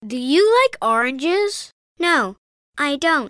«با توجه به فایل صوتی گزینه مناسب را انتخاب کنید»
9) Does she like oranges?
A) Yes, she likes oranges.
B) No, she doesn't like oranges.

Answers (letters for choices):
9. B